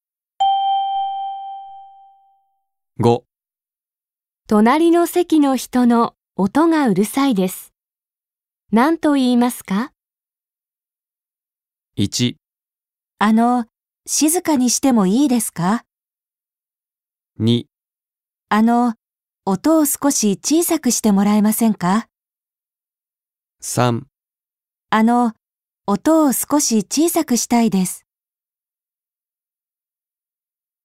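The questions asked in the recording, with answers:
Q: 隣の席の人の音がうるさいです。何と言いますか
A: 2: 音を少し小さくしてもらえませんか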